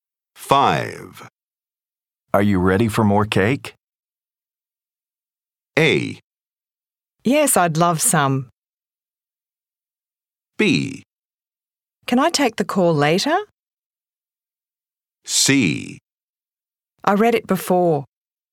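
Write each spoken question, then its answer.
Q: Are you ready for more cake?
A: A: Yes, I'd love some.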